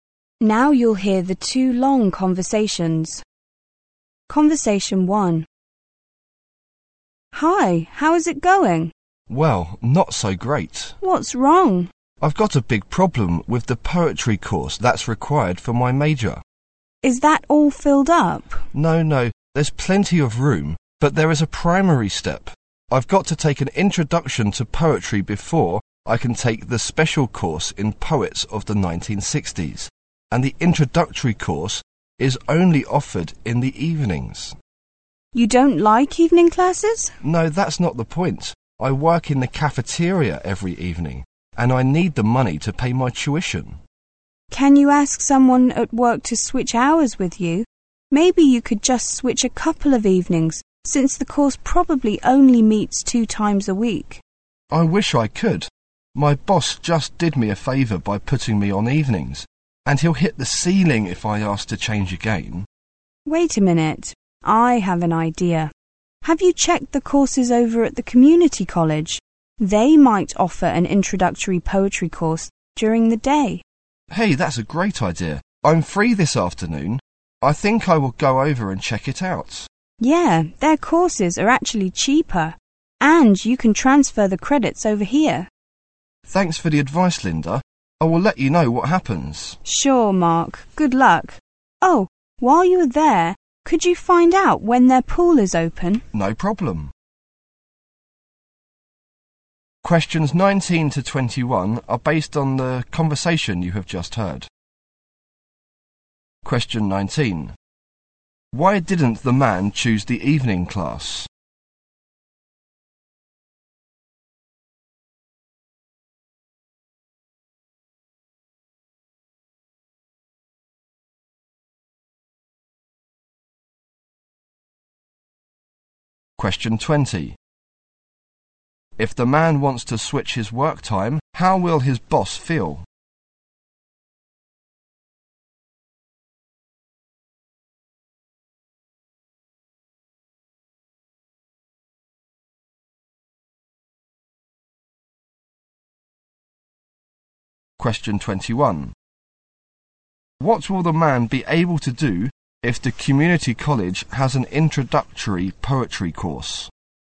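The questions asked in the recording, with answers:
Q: Why didn't the man choose the evening class?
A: He works in the cafeteria every evening

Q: If the man wants to switch his work time, how will his boss feel?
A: Very angry

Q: What will the man be able to do if the community college has an introductory poetry course?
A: Take it during the day and transfer the credits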